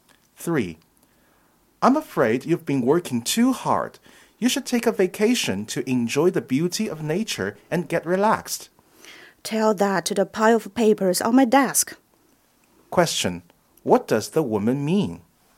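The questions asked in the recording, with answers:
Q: What does the woman mean?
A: She has too much work to take a vacation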